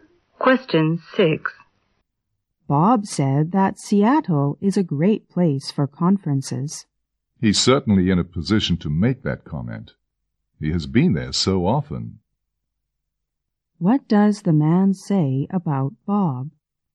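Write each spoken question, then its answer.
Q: What does the man say about Bob?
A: Bob knows Seattle well because he has been there often.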